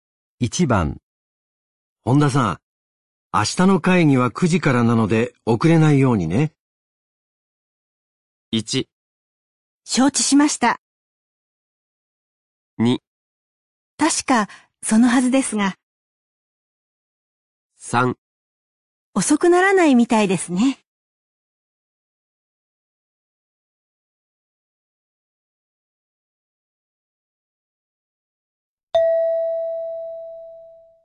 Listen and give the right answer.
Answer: 1

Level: N3 Listening · Test 12